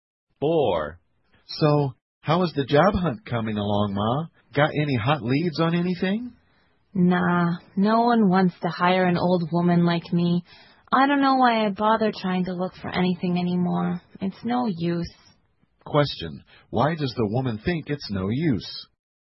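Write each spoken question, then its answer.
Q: Why does the woman think it's no use?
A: No one wants to hire an old woman like her.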